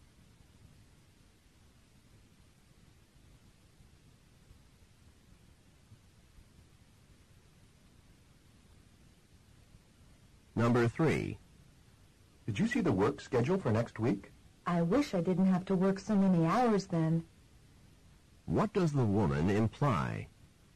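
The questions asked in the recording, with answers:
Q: What does the woman imply?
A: She has to work many hours next week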